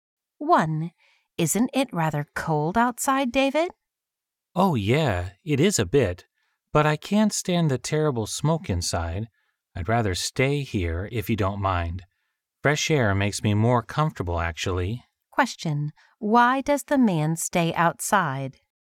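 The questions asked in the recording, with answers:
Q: Why does the man stay outside?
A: He can't stand the smoke inside; fresh air is more comfortable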